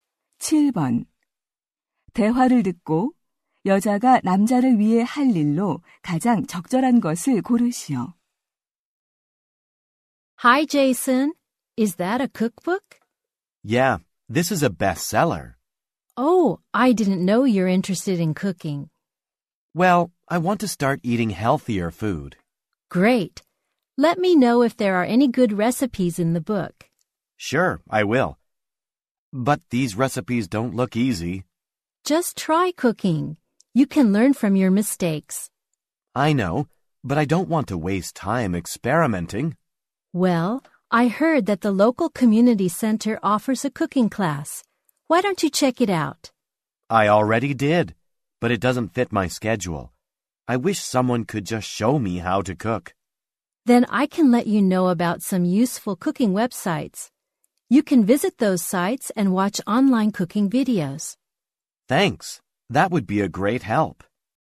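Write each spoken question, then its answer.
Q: 대화를 듣고 여자가 남자를 위해 할 일로 가장 적절한 것을 고르시오.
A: 유용한 요리 웹사이트 알려 주기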